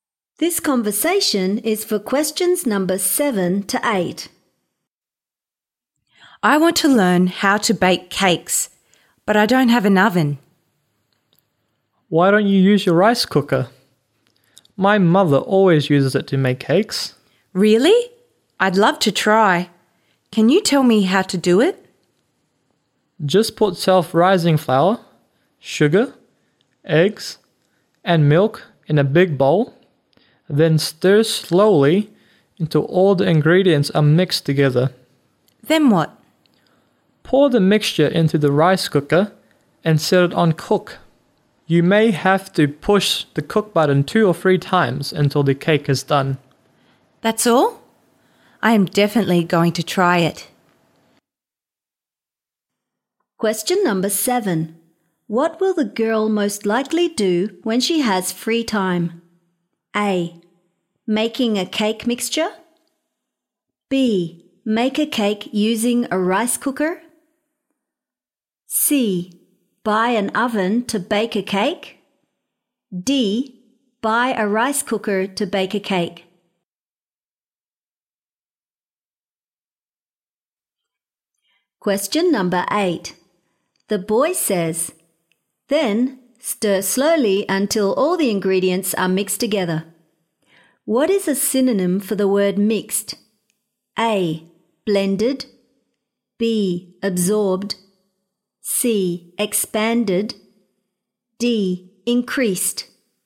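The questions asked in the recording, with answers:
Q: What will the girl most likely do when she has free time?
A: B: Make a cake using a rice cooker.

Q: What is a synonym for the word mixed?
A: A: Blended.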